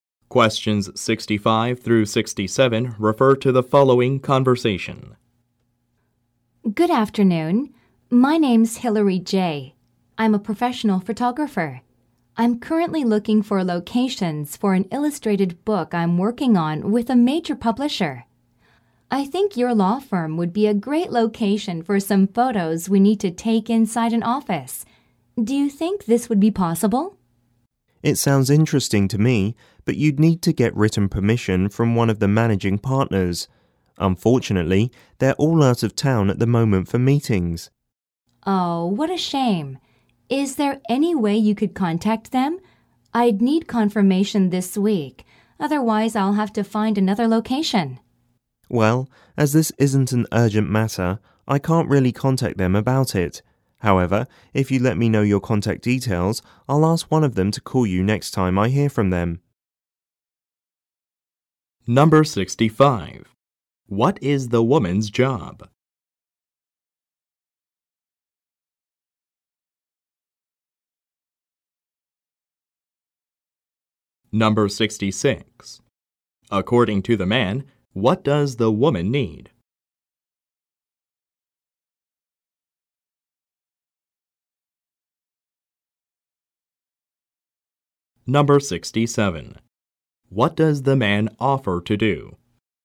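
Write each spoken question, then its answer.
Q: What is the woman's job?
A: A photographer

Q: According to the man, what does the woman need?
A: Written permission from a managing partner

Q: What does the man offer to do?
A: Ask a partner to call her when he hears from them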